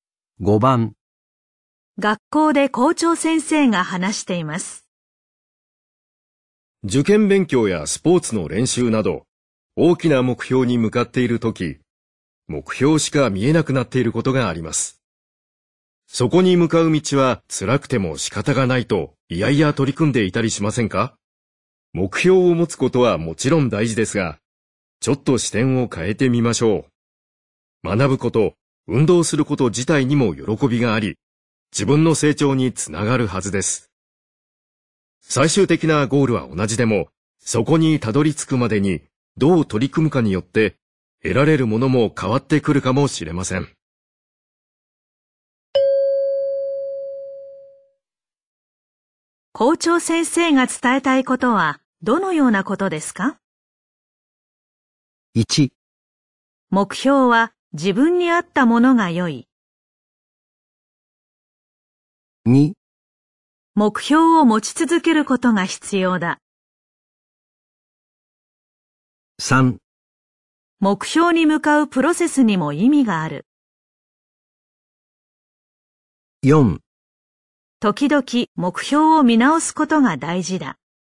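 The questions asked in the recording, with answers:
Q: 校長先生が伝えたいことはどのようなことですか?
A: 3: 目標に向かうプロセスにも意味がある。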